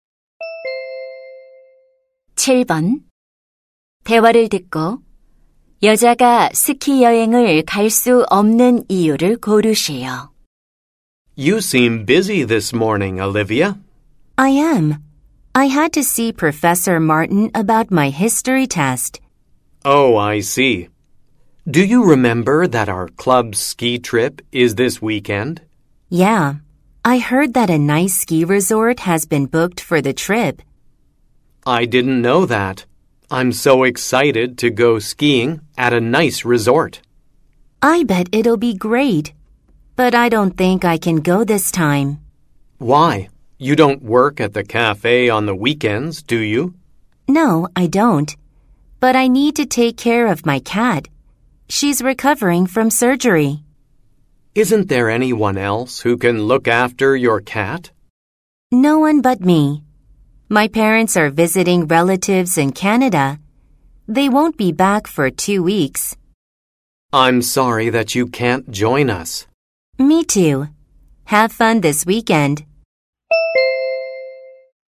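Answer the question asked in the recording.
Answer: 수술에서 회복 중인 고양이를 돌봐야 해서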